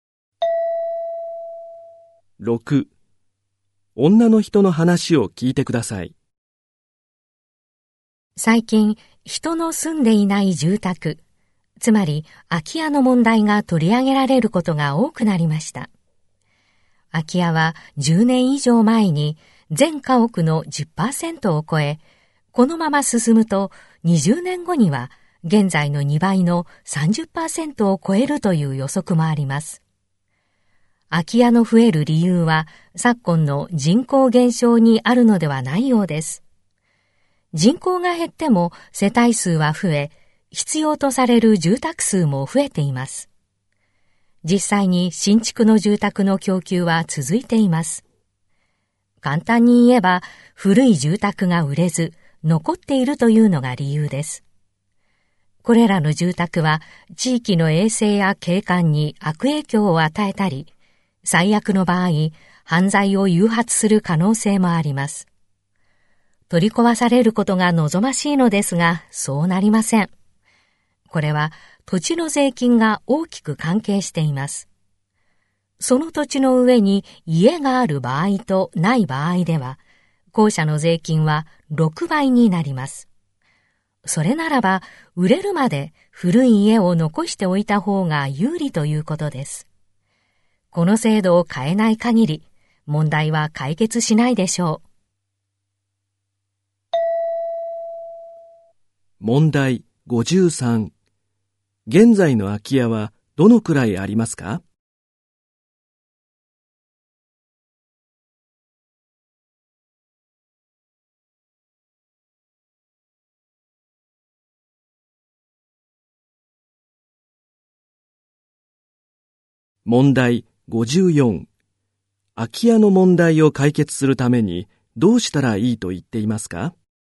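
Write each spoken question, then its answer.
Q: 空き家の問題を解決するためにどうしたらいいと言っていますか?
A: 土地の税金の制度を変える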